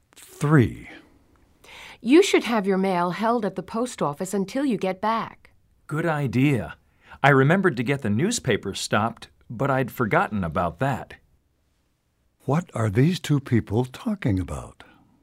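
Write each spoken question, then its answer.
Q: What are these two people talking about?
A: Stopping the mail and newspaper while away on a trip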